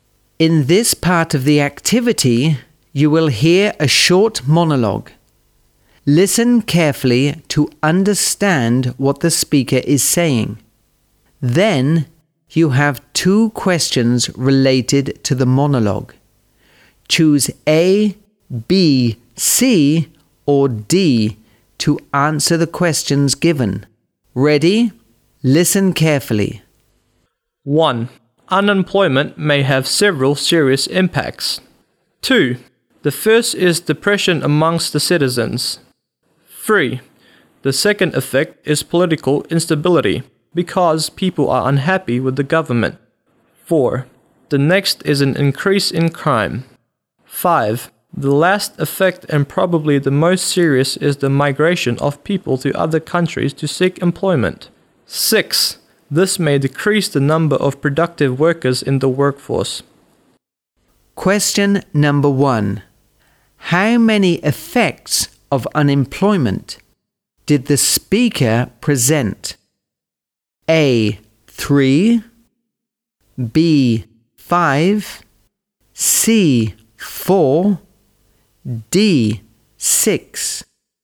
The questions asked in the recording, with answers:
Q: How many effects of unemployment did the speaker present?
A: C. 4.